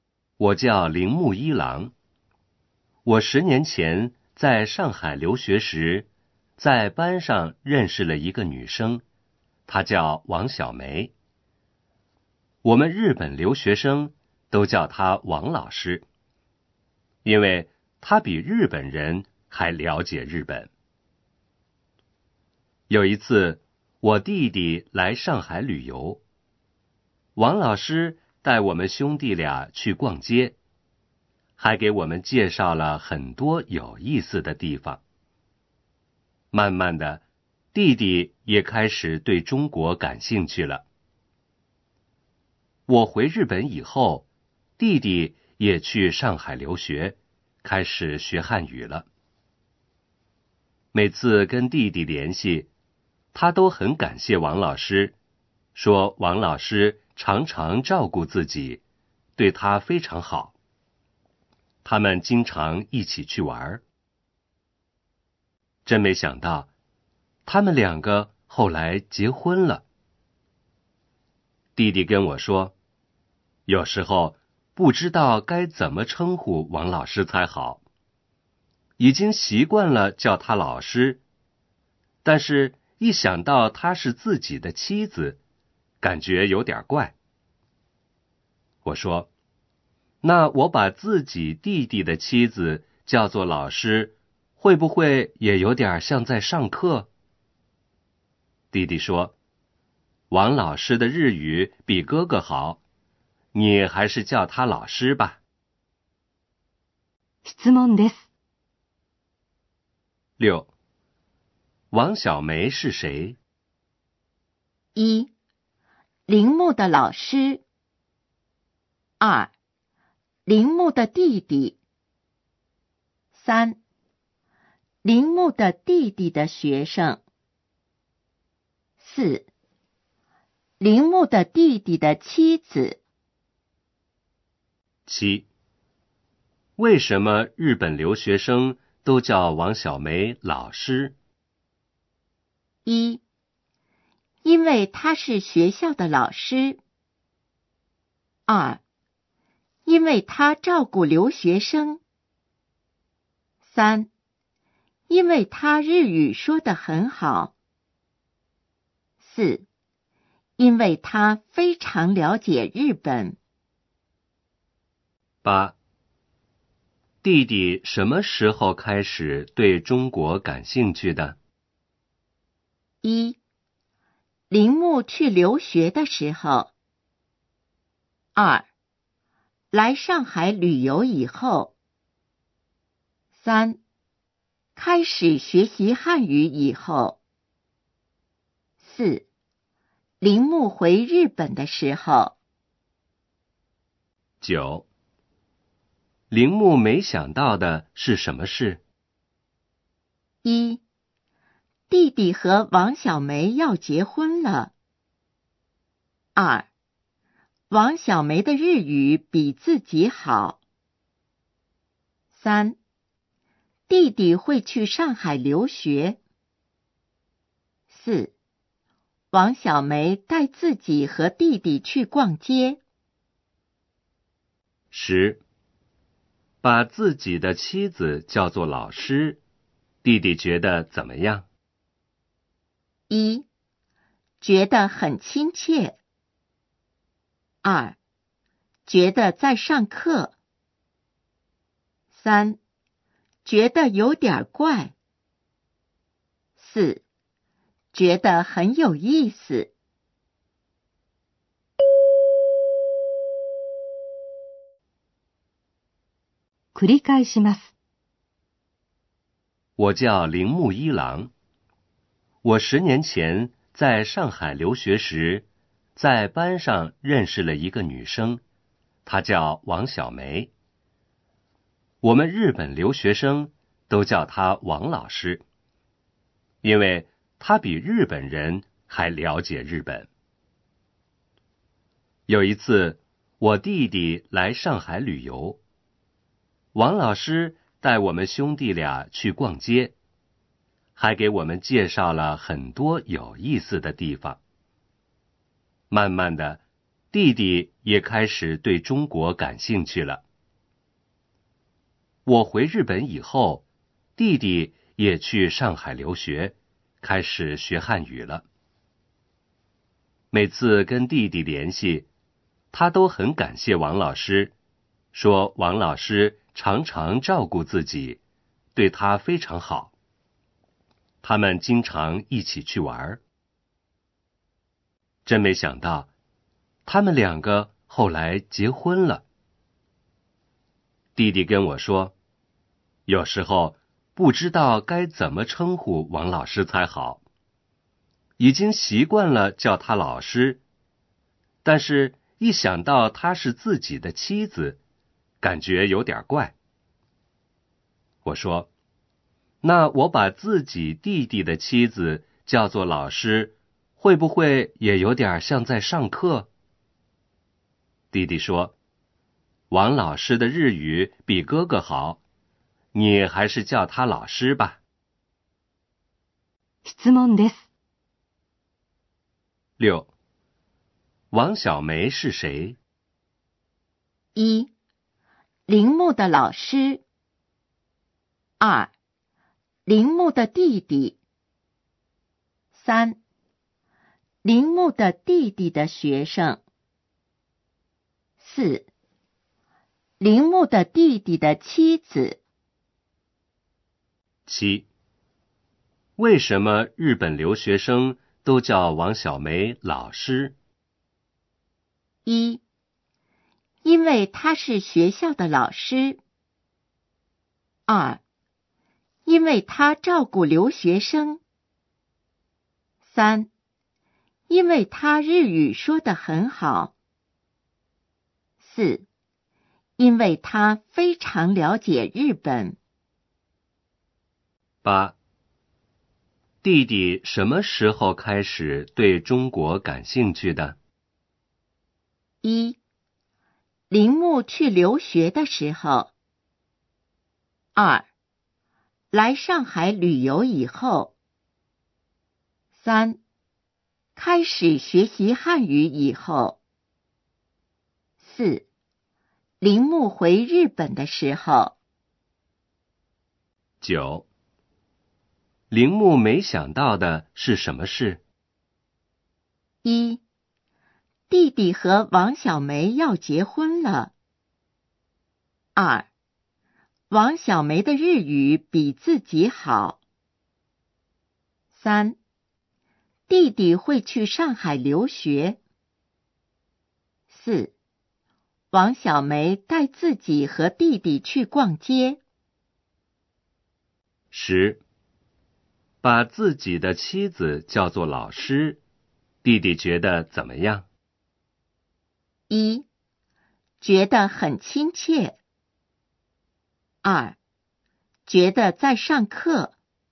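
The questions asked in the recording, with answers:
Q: 王小梅是谁?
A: 4: 铃木的弟弟的妻子。

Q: 为什么日本留学生都叫王小梅老师?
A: 4: 因为他非常了解日本。

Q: 弟弟什么时候开始对中国感兴趣的?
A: 2: 来上海旅游以后。

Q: 铃木没想到的是什么事?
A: 1: 弟弟和王小梅要结婚了。

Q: 把自己的妻子叫做老师,弟弟觉得怎么样?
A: 3: 觉得有点怪。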